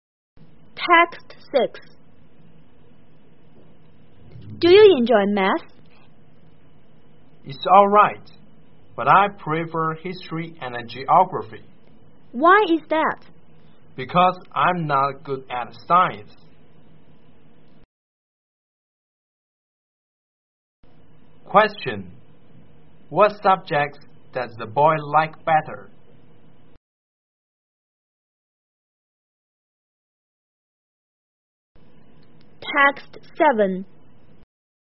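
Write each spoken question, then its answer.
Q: What subjects does the boy like better?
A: History and geography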